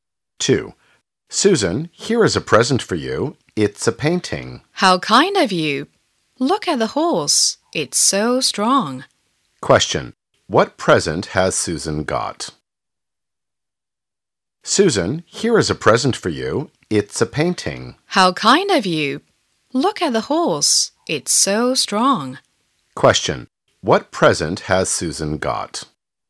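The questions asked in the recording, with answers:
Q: What present has Susan got?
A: A painting of a horse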